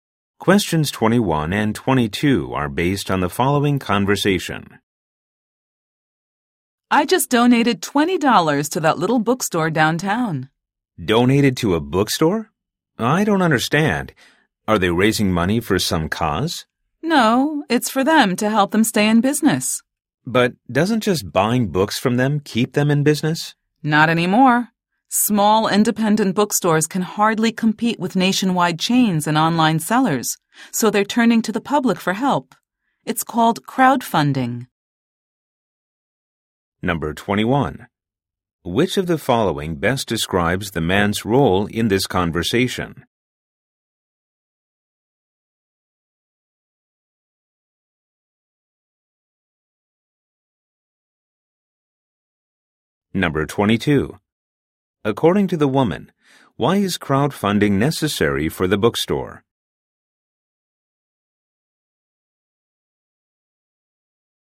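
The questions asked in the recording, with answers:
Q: According to the woman, why is crowdfunding necessary for the bookstore?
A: Small bookstores can hardly compete with chains and online sellers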